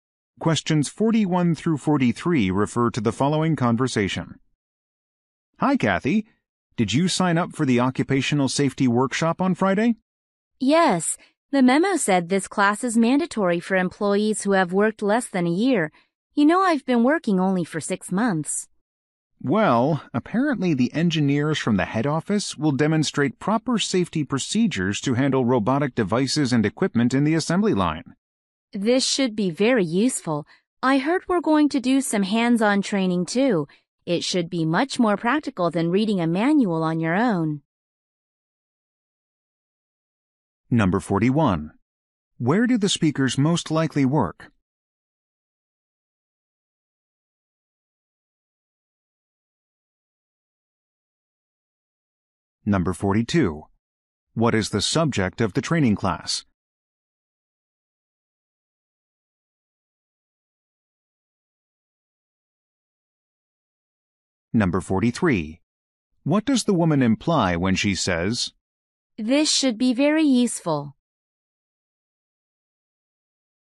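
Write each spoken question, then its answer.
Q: Where do the speakers most likely work?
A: At a manufacturing plant with an assembly line

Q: What is the subject of the training class?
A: Safety procedures for handling robotic equipment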